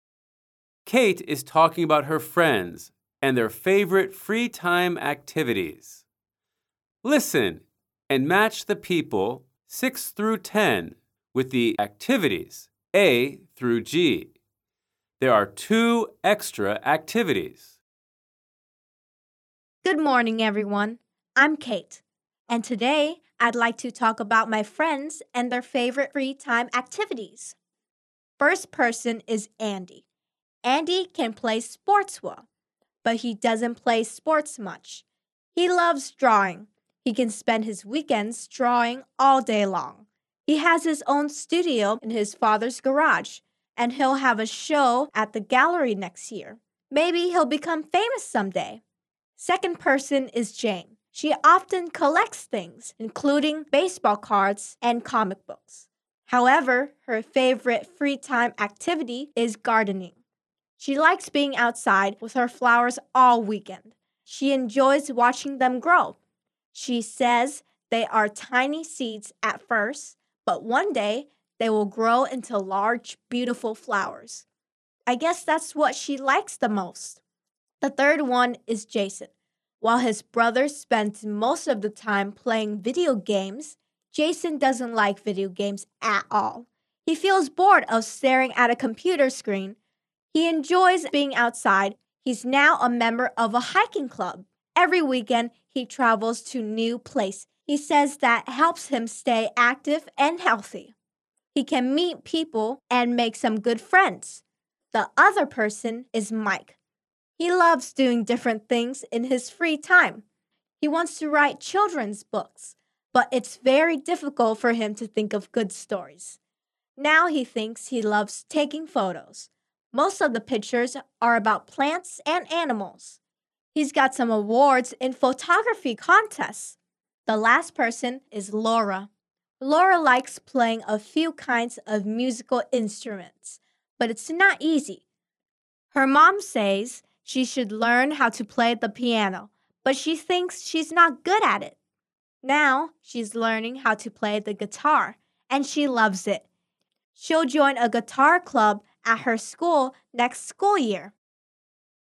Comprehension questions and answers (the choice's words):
Kate is talking about her friends and their favourite free-time activities. Listen and match the people with the activities.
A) playing the guitar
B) gardening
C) hiking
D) drawing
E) taking photos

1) Andy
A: drawing

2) Jane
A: gardening

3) Jason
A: hiking

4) Mike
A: taking photos

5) Laura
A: playing the guitar

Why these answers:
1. First person is Andy... He loves drawing. He can spend his weekends drawing all day long. (Người đầu tiên là Andy... Cậu ấy rất thích vẽ. Cậu ấy có thể dành cả ngày cuối tuần để vẽ.)
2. Second person is Jane... However, her favorite free time activity is gardening. (Người thứ hai là Jane... Tuy nhiên, hoạt động yêu thích của cô ấy vào thời gian rảnh là làm vườn.)
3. The third one is Jason... He enjoys being outside. He's now a member of a hiking club. (Người thứ ba là Jason... Anh ấy thích các hoạt động ngoài trời. Hiện tại, anh ấy là thành viên của một câu lạc bộ đi bộ đường dài.)
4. The other person is Mike... Now he thinks he loves taking photos. (Người tiếp theo là Mike... Giờ đây, anh ấy nhận ra mình rất thích chụp ảnh.)
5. The last person is Laura... Now she's learning how to play the guitar, and she loves it. (Người cuối cùng là Laura... Cô ấy đang học chơi đàn guitar và rất thích thú với việc này.)

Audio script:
I'm Kate, and today I'd like to talk about my friends and their favorite free time activities.
First person is Andy. Andy can play sports well, but he doesn't play sports much. He loves drawing. He can spend his weekends drawing all day long. He has his own studio in his father's garage, and he'll have a show at the gallery next year. Maybe he'll become famous someday.
Second person is Jane. She often collects things, including baseball cards and comic books. However, her favorite free time activity is gardening. She likes being outside with her flowers all weekend. She enjoys watching them grow. She says they are tiny seeds at first, but one day they will grow into large, beautiful flowers. I guess that's what she likes the most.
The third one is Jason. While his brother spends most of the time playing video games, Jason doesn't like video games at all. He feels bored of staring at a computer screen. He enjoys being outside. He's now a member of a hiking club. Every weekend, he travels to new places. He says that helps him stay active and healthy. He can meet people and make some good friends.
The other person is Mike. He loves doing different things in his free time. He wants to write children's books, but it's very difficult for him to think of good stories. Now he thinks he loves taking photos. Most of the pictures are about plants and animals. He's got some awards in photography contests.
The last person is Laura. Laura likes playing a few kinds of musical instruments, but it's not easy. Her mom says she should learn how to play the piano, but she thinks she's not good at it. Now she's learning how to play the guitar, and she loves it. She'll join a guitar club at her school next school year.

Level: Anh10